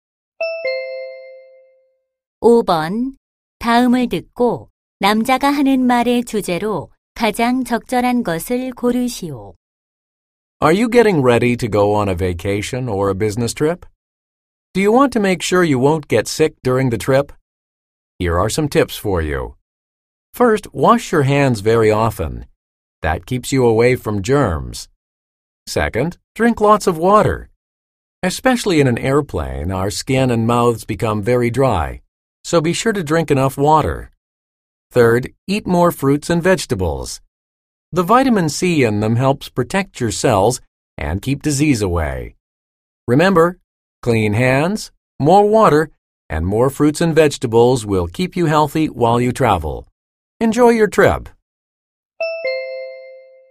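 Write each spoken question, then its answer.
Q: 다음을 듣고 남자가 하는 말의 주제로 가장 적절한 것을 고르시오.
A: 여행 중 건강을 지키는 방법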